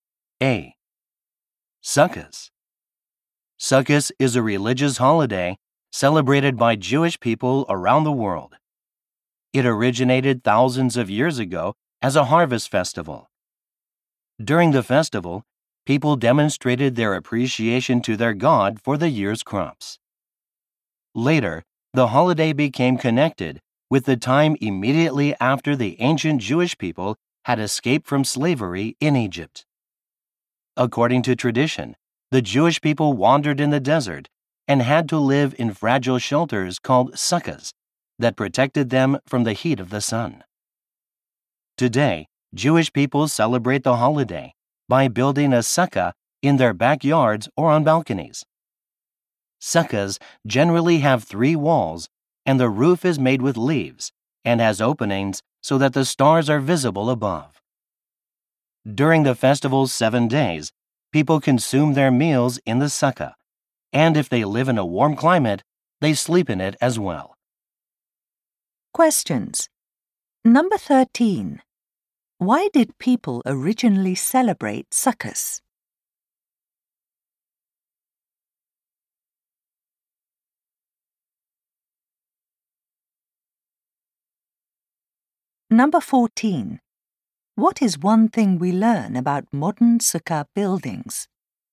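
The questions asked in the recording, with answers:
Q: Why did people originally celebrate sukkahs?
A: To thank their God for the year's crops (a harvest festival)

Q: What is one thing we learn about modern sukkah buildings?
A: They have three walls and a leaf roof with openings so the stars are visible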